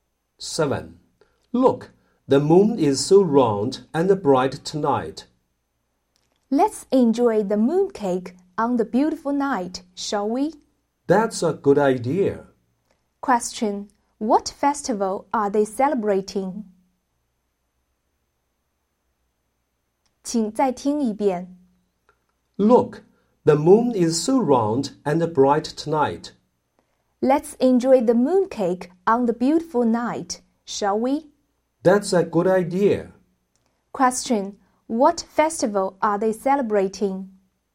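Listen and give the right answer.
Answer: The Mid-Autumn Festival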